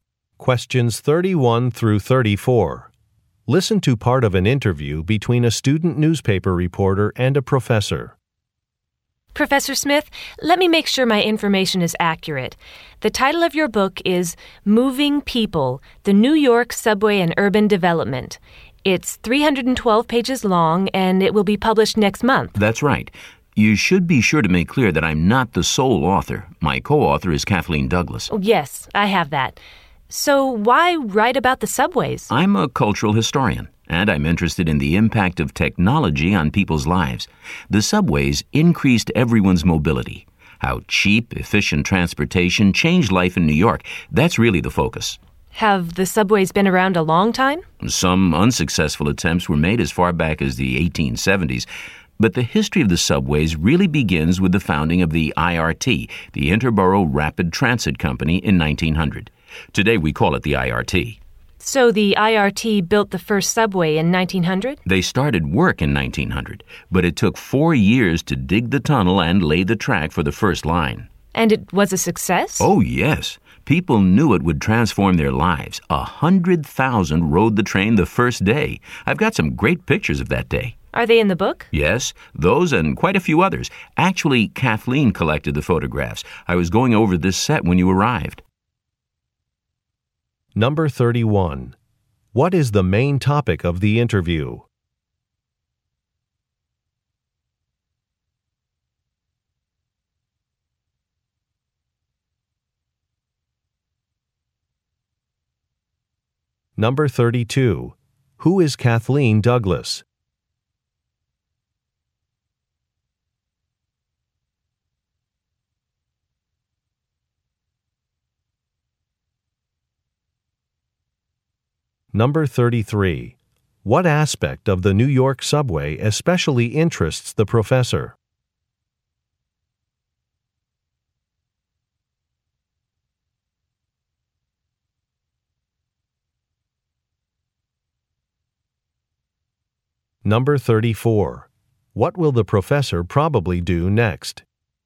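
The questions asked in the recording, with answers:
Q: What is the main topic of the interview?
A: The professor's book about the New York subway and urban development

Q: Who is Kathleen Douglas?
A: The professor's co-author, who collected the photographs

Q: What aspect of the New York subway especially interests the professor?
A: Its impact on people's lives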